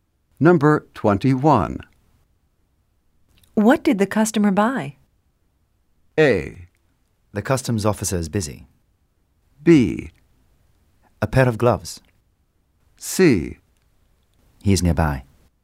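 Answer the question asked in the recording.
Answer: B: A pair of gloves.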